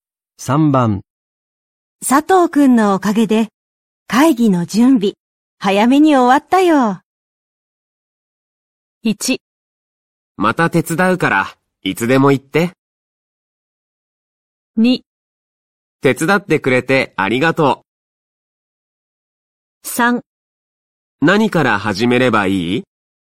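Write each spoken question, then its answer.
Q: 佐藤くんのおかげで、会議の準備、早めに終わったよ。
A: 1: また手伝うから、いつでも行って。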